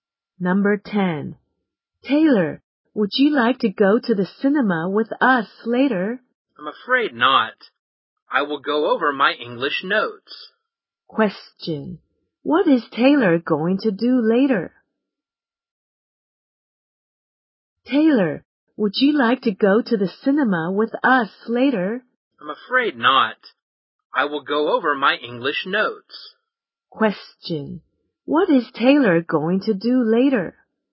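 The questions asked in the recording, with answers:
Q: What is Taylor going to do later?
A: Go over his English notes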